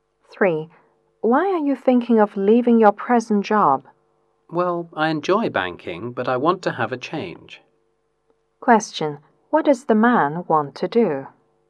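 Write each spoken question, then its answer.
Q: Question.What does the man want to do?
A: Change his job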